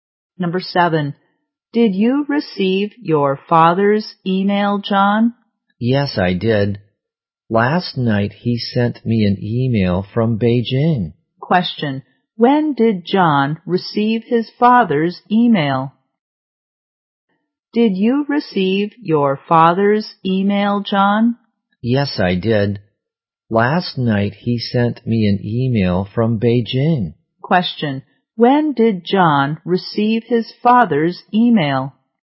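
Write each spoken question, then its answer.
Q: Question. When did John receive his father's email?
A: Last night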